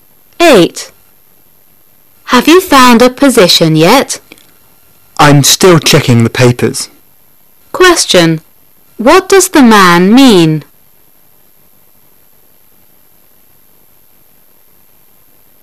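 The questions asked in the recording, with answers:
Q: What does the man mean?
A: He hasn't found a job yet and is still looking in the newspaper ads.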